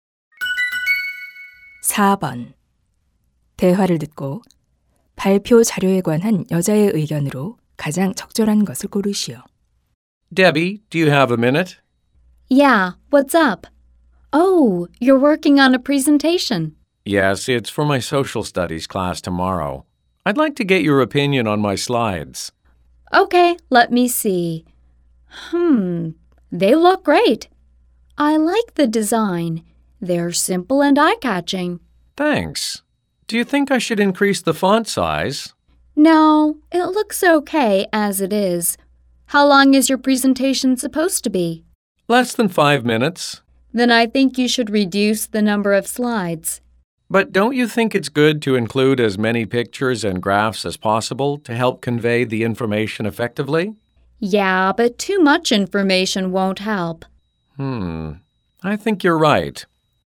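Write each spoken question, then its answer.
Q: 대화를 듣고 발표 자료에 관한 여자의 의견으로 가장 적절한 것을 고르시오.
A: 슬라이드 수를 줄여야 한다.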